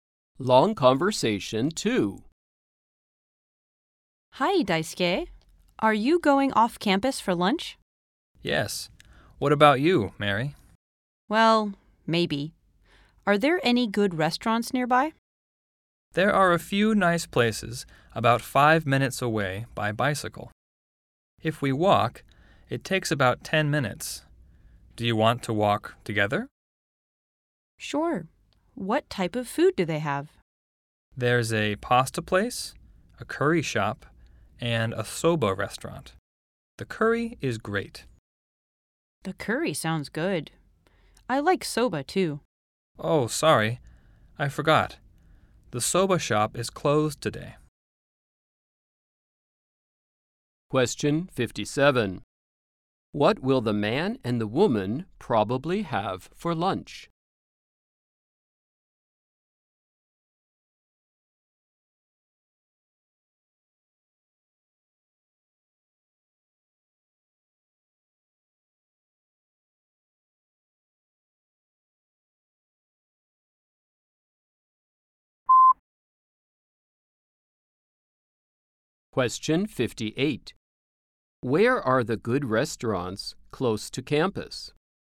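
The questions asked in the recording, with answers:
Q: What will the man and the woman probably have for lunch?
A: Curry

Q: Where are the good restaurants close to campus?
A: About 5 minutes away by bicycle (10 minutes on foot), off campus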